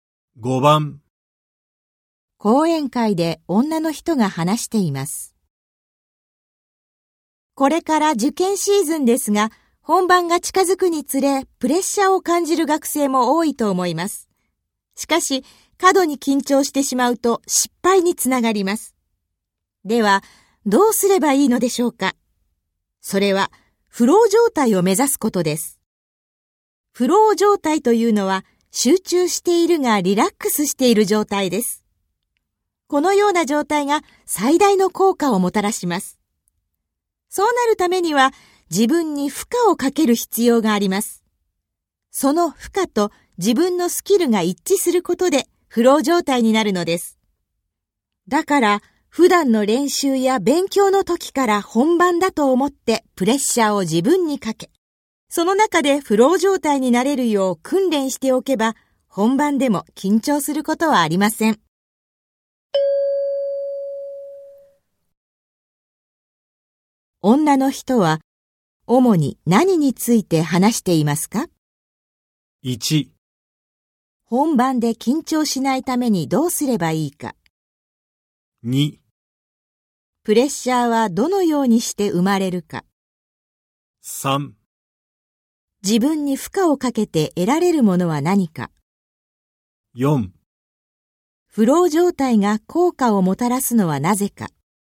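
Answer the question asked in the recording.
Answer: 1: 本番で緊張しないためにどうすればいいか。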